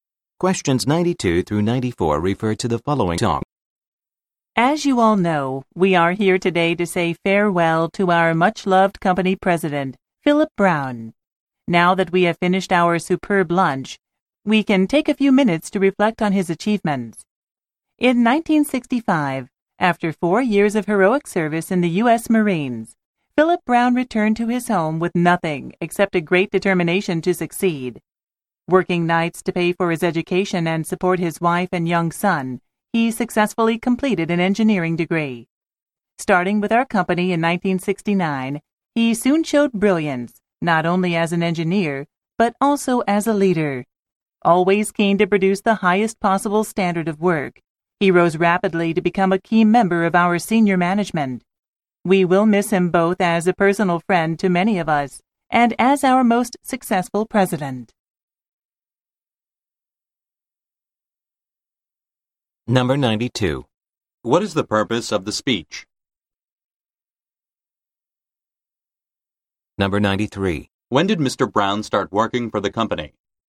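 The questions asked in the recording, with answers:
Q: What is the purpose of the speech?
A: To say farewell to a retiring company president

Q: When did Mr. Brown start working for the company?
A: In 1969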